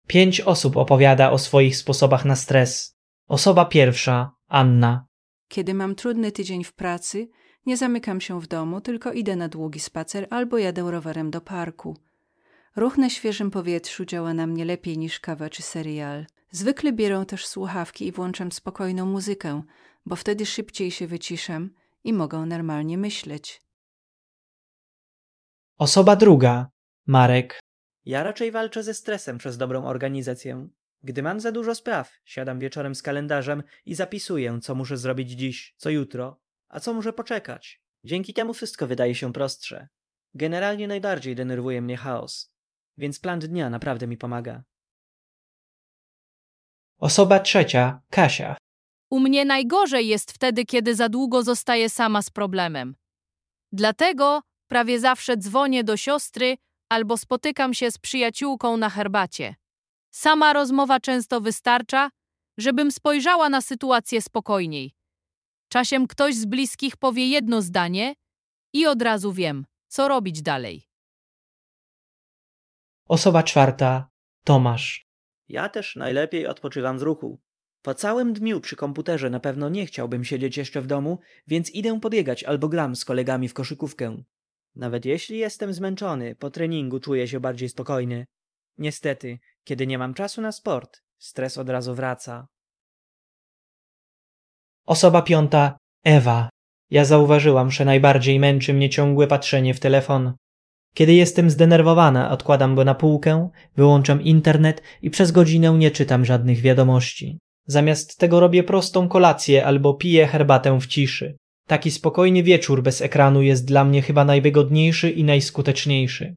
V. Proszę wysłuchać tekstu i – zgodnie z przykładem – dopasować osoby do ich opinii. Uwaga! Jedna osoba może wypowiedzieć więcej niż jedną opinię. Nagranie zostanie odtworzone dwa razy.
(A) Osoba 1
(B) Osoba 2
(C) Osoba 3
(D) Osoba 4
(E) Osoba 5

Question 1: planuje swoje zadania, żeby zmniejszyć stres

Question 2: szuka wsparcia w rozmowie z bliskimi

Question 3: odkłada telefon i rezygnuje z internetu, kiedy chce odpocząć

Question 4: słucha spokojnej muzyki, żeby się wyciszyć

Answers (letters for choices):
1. B
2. C
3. E
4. A